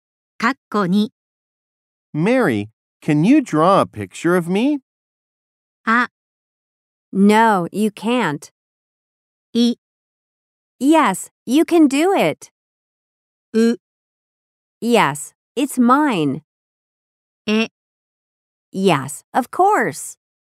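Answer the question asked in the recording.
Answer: え: Yes, of course.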